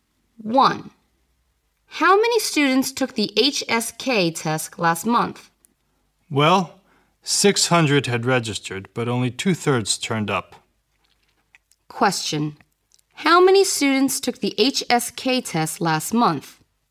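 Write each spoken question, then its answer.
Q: How many students took the HSK test last month?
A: 400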